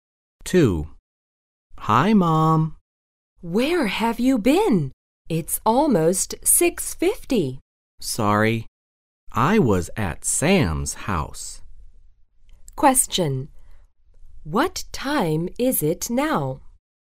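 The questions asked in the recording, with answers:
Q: What time is it now?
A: Almost 6:50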